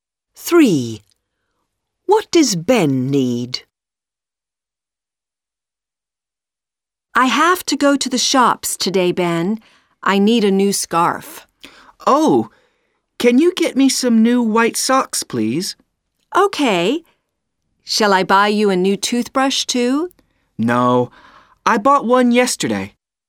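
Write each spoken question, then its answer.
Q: What does Ben need?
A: New white socks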